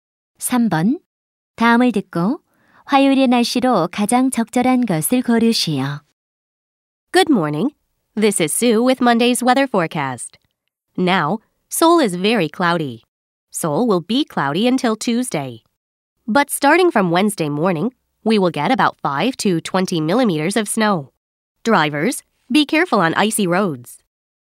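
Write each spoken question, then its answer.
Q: 다음을 듣고 화요일의 날씨로 가장 적절한 것을 고르시오.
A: 흐림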